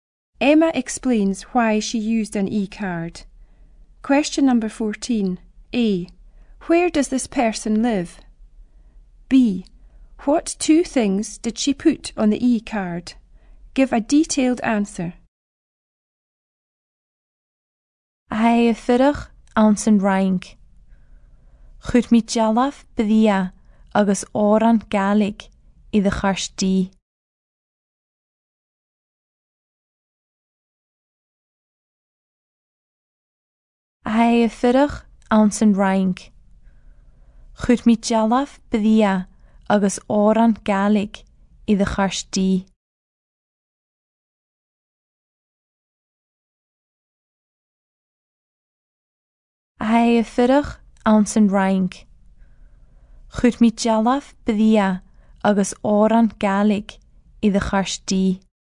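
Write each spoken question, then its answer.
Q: A. Where does this person live?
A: In France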